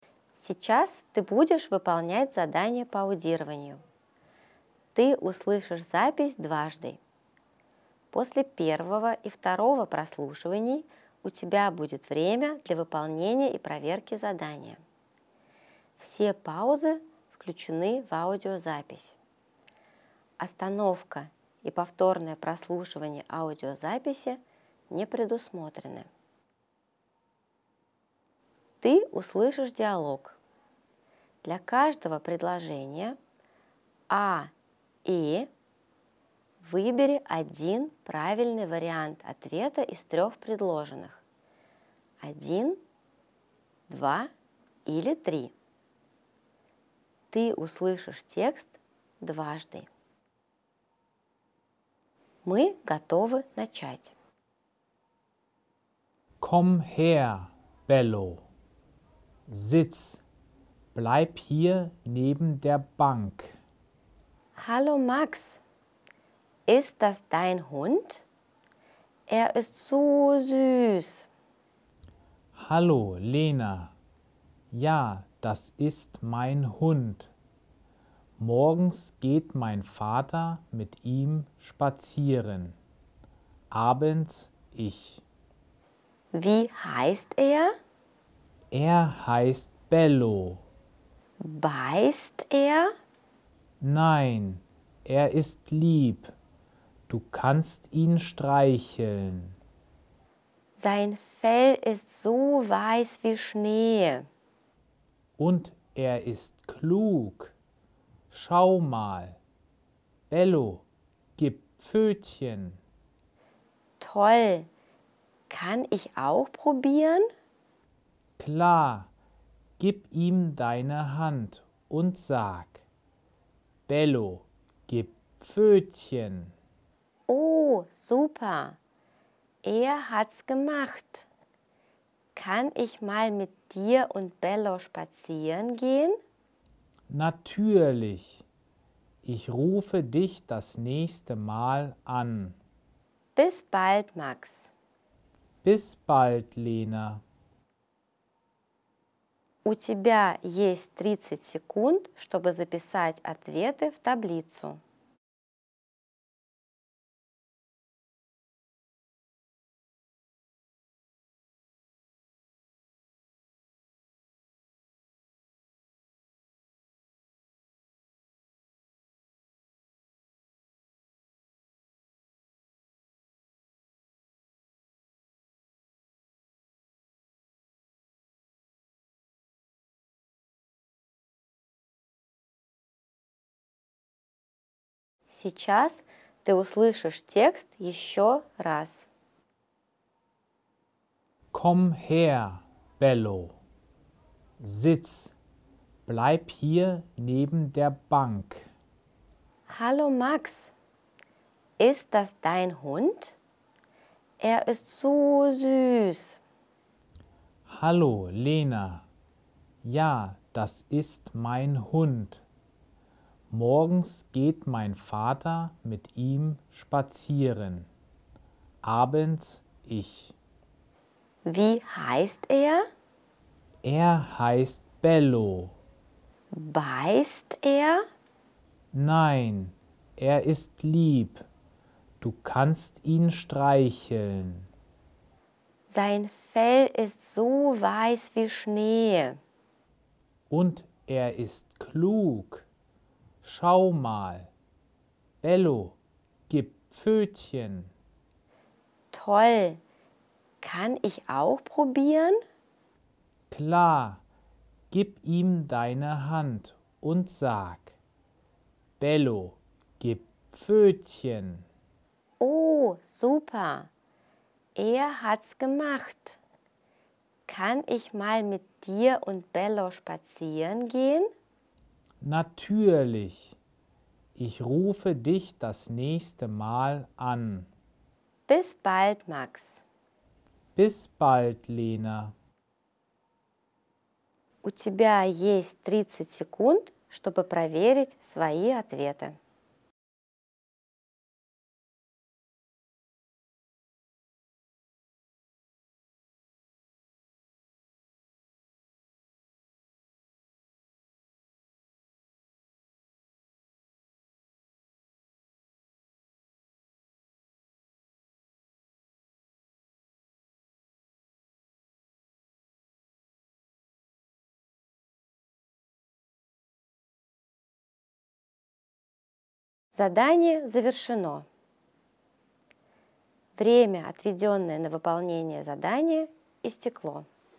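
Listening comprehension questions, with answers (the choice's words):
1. Max geht mit dem Hund ... spazieren.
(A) einmal am Tag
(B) zweimal am Tag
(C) dreimal am Tag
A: einmal am Tag

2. Bellos Fell ist ...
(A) schwarz.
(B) weiß.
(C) grau.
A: weiß.

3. Bello gibt ... die Pfote.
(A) nur Lena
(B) nur Max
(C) Lena und Max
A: Lena und Max

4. Lena möchte ...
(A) mit Bello spazieren gehen.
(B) einen Hund kaufen.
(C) den Hund nehmen.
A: mit Bello spazieren gehen.

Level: 4 класс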